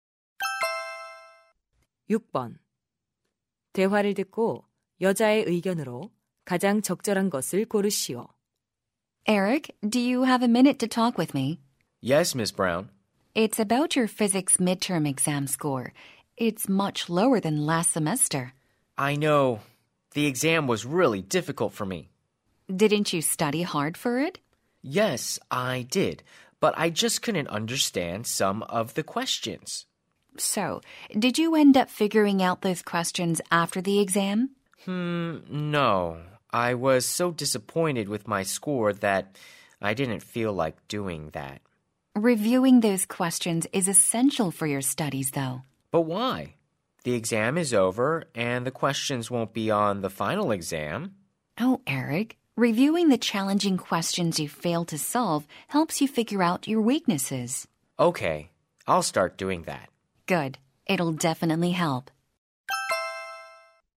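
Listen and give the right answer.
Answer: 틀린 문제를 복습하면 약점을 파악하는 데 도움이 된다.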